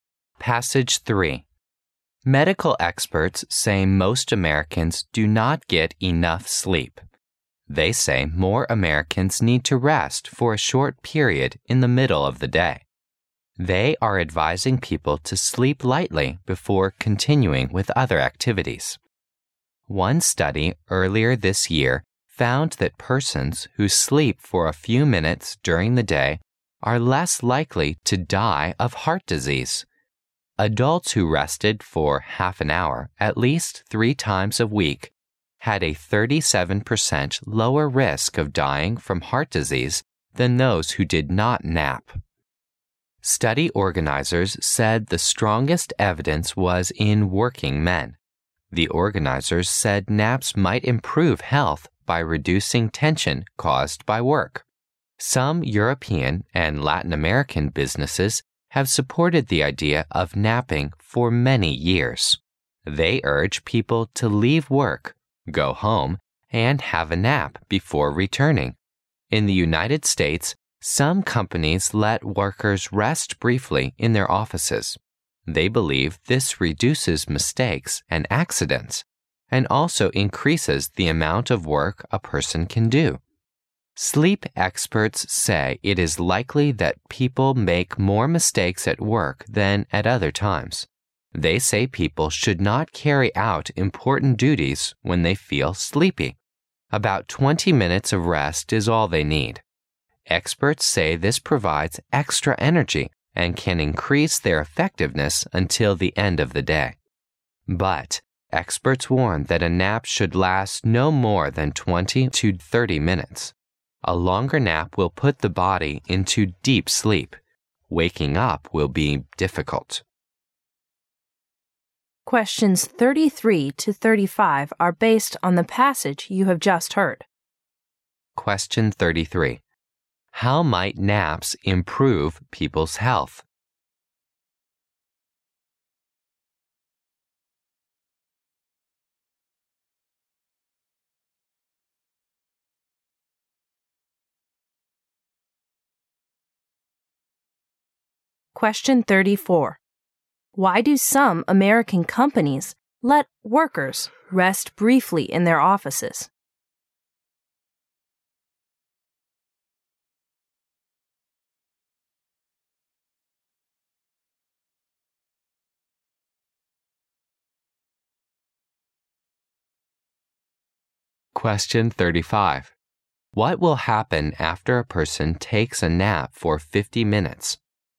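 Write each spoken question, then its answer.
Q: How might naps improve people's health?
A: By reducing tension caused by work

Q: Why do some American companies let workers rest briefly in their offices?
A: To reduce mistakes and accidents and increase work output

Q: What will happen after a person takes a nap for 50 minutes?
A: The body goes into deep sleep and waking up is difficult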